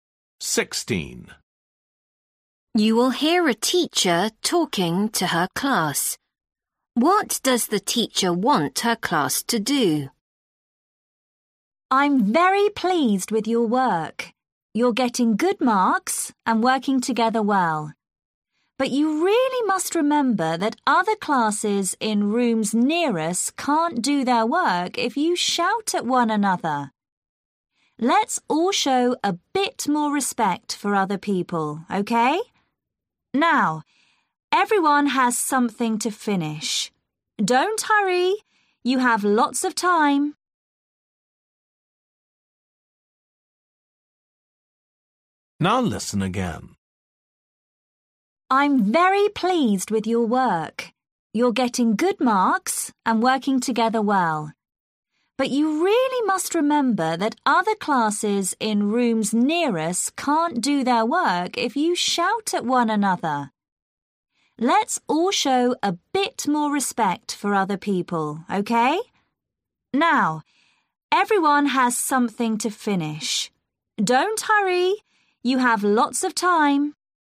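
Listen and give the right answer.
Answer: Be quieter and not shout, out of respect for other classes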